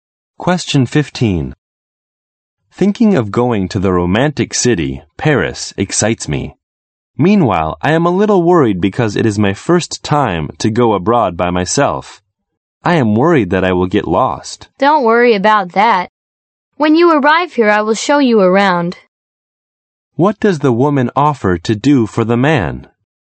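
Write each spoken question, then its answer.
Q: What does the woman offer to do for the man?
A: Show him around Paris.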